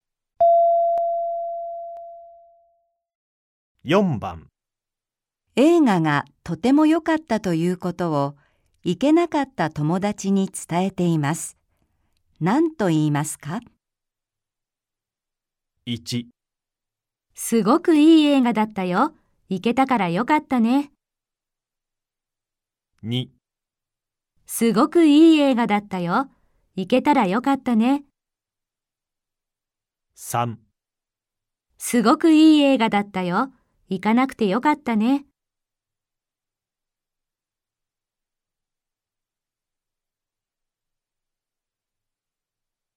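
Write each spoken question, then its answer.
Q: 映画がとても良かったということを行けなかった友達に伝えています。 何と言いますか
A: 2: すごくいい映画だったよ。行けたらよかったね。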